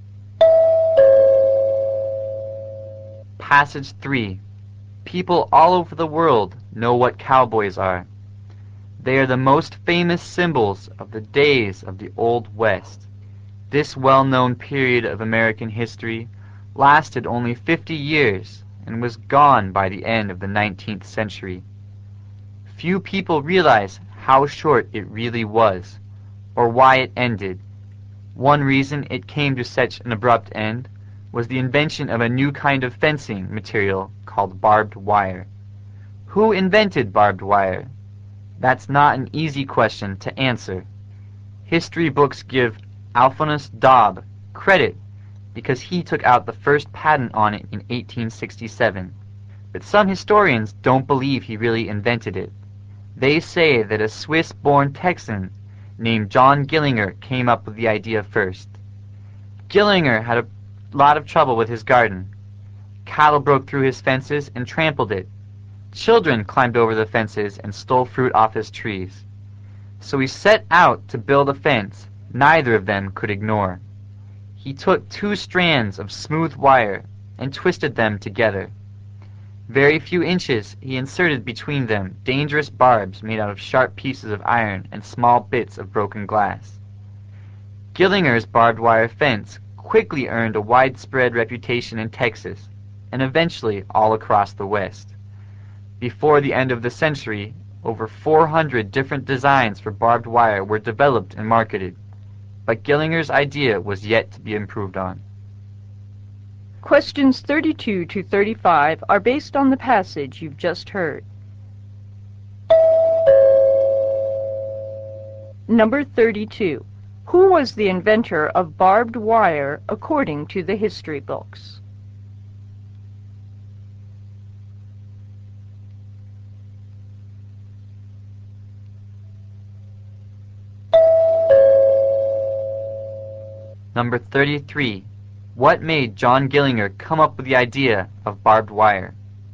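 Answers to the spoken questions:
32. Alphonse Daube.
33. Cattle broke through his fences and trampled his garden, and children stole his fruit.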